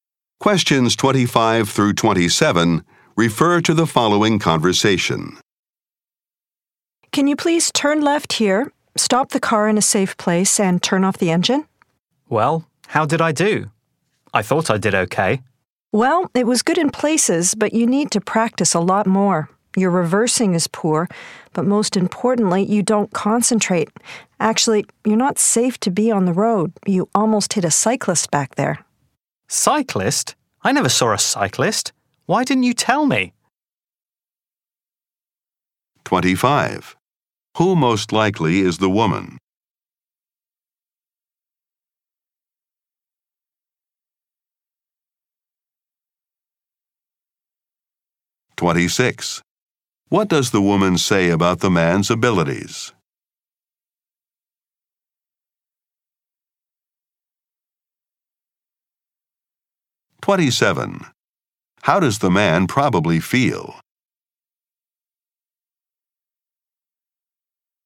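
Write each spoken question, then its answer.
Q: Who most likely is the woman?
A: A driving examiner

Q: What does the woman say about the man's abilities?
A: He needs more practice and is not safe on the road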